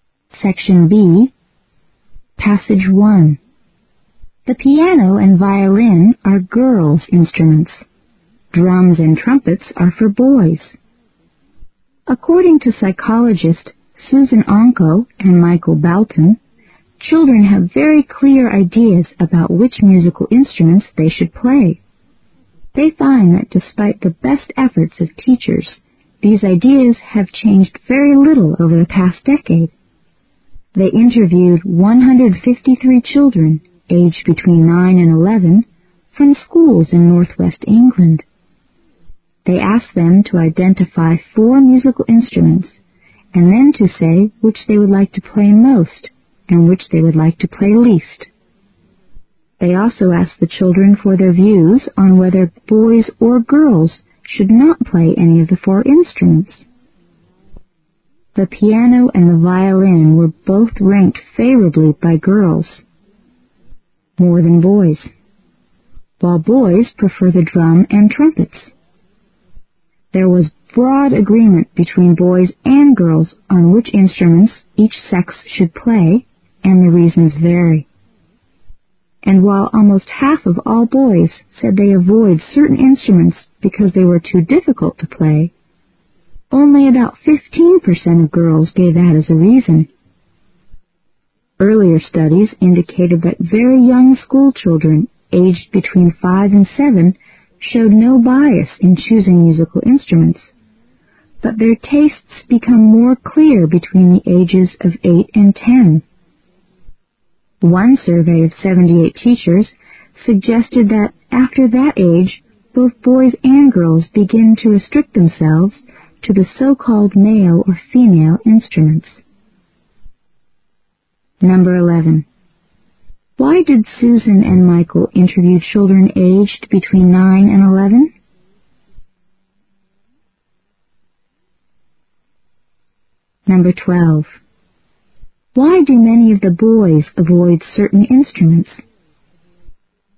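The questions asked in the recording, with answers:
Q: Why do many of the boys avoid certain instruments?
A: They think those instruments are too difficult to play

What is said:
The piano and violin are girls' instruments. Drums and trumpets are for boys. According to psychologists Susan Onco and Michael Balton, children have very clear ideas about which musical instruments they should play. They find that despite the best efforts of teachers these ideas have changed very little over the past decade. They interviewed 153 children aged between 9 and 11 from schools in northwest England. They asked them to identify 4 musical instruments and then to say which they would like to play most and which they would least lie to play.They also asked the children for their views on whether boys or girls should not play any of the 4 instruments. The piano and the violin were both ranked more favorably by girls than by boys, while boys prefer the drums and trumpets. 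There was broad agreement between boys and girls on which instruments each sex should play and the reasons vary. And while almost half of all boys said they avoid certain instruments because they were too difficult to play, only 15% of girls gave that as a reason. Earlier studies indicated that very young school children aged between 5 and 7 showed no bias in choosing musical instruments, but their tastes become more clear between the ages of 8 and 10. One survey of 78 teachers suggested that after that age both boys and girls.
11. Why did Susan and Michael interview children aged between 9 and 11?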